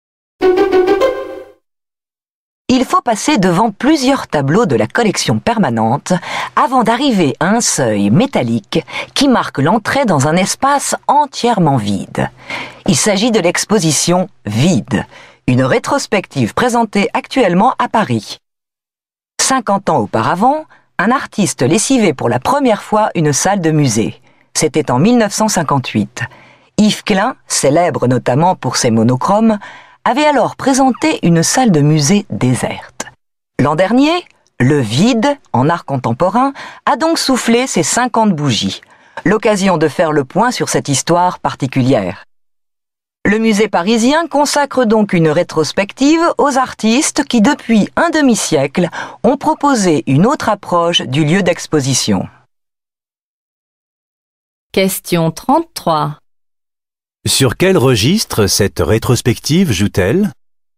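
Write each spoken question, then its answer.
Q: Sur quel registre cette rétrospective joue-t-elle ?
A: Le vide : des salles d'exposition vides.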